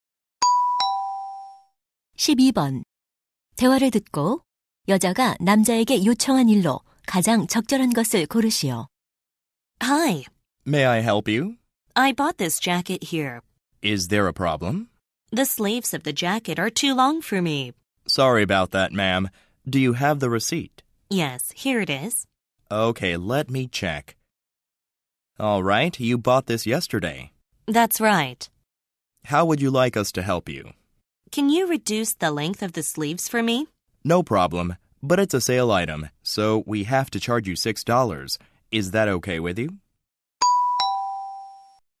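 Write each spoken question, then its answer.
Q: 대화를 듣고 여자가 남자에게 요청한 일로 가장 적절한 것을 고르시오.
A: 재킷 소매 길이 줄이기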